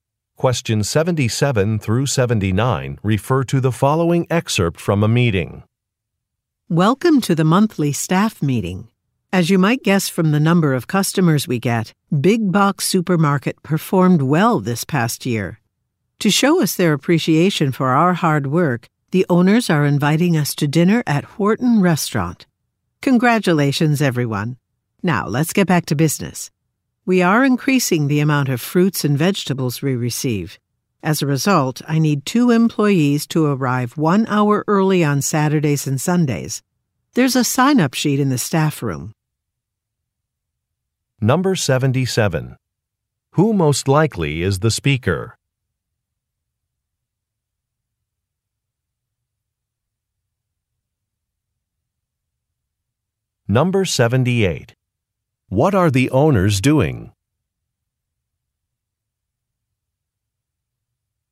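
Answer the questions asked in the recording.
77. A supermarket manager
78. Inviting staff to dinner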